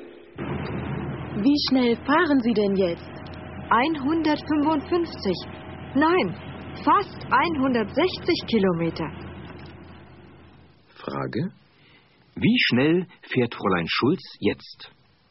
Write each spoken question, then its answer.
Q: Frage: Wie schnell fährt Fräulein Schulz jetzt?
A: Sie fährt fast 160.